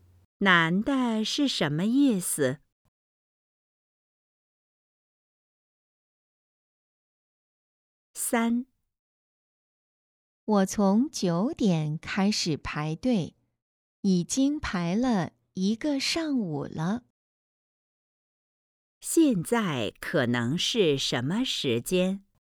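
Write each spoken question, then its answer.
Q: 现在可能是什么时间?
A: 中午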